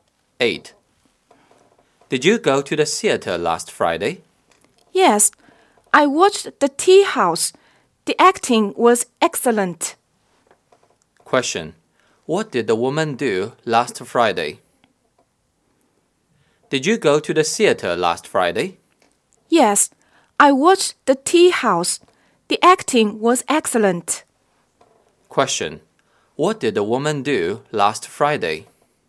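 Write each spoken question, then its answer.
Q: What did the woman do last Friday?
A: She went to the theater and watched the play Tea House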